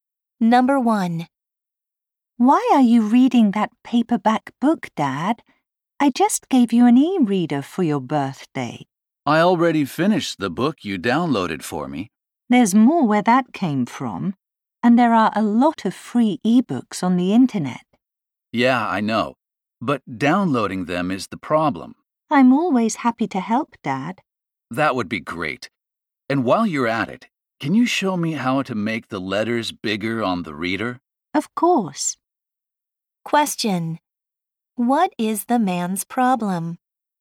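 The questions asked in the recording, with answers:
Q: What is the man's problem?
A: He has trouble downloading ebooks.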